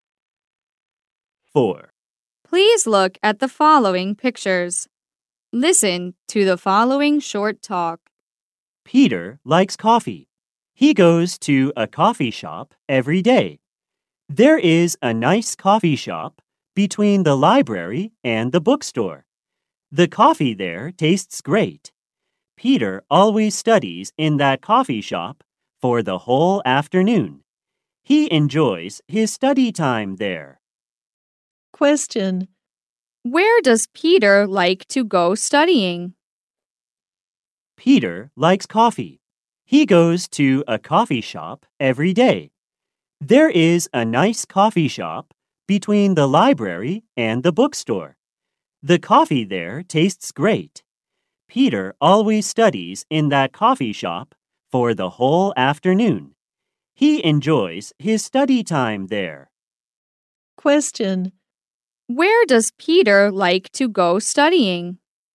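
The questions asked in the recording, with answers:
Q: Where does Peter like to go studying?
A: A coffee shop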